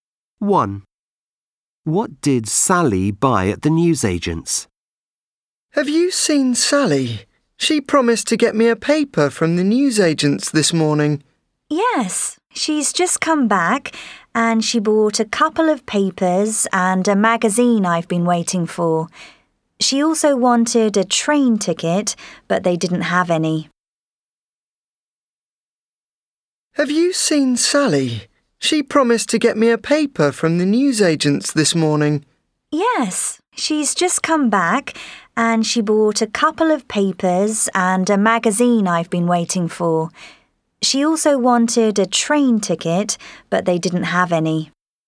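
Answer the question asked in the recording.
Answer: A couple of papers and a magazine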